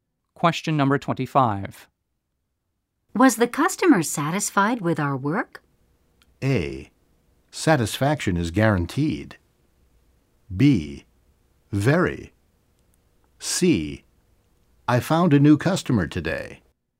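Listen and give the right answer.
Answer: B: Very.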